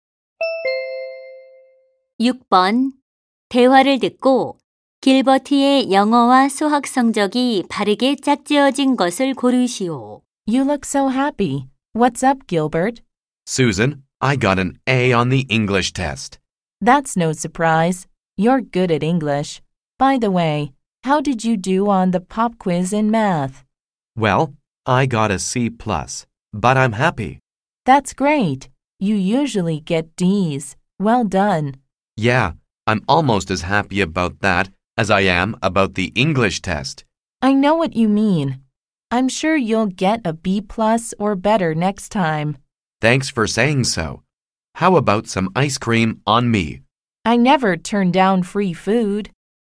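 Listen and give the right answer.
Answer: 영어 A, 수학 C+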